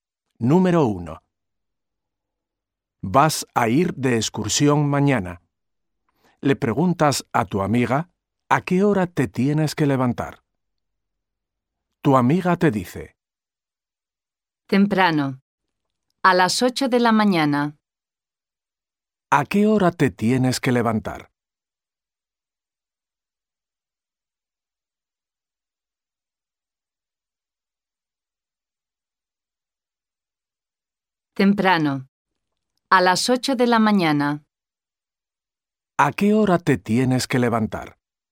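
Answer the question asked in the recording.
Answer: A las 8 de la mañana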